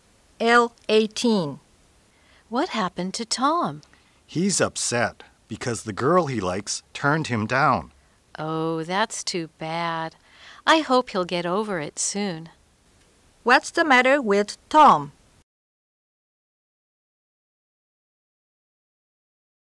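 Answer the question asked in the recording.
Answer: The girl he likes turned him down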